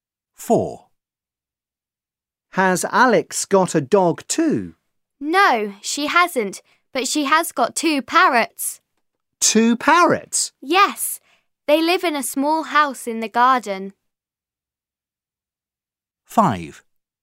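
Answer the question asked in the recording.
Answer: No, she has two parrots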